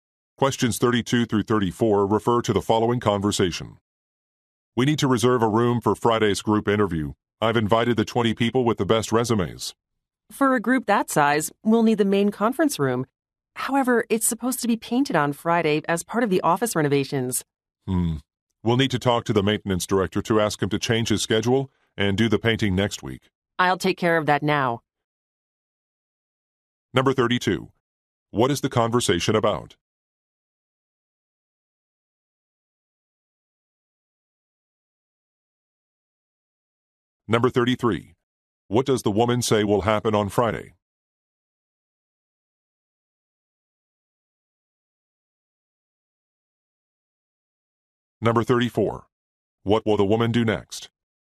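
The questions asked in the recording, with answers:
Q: What is the conversation about?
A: Reserving a room for a group interview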